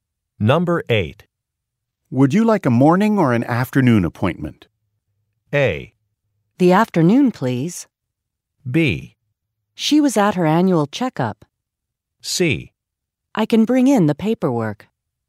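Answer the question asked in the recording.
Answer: A: The afternoon, please.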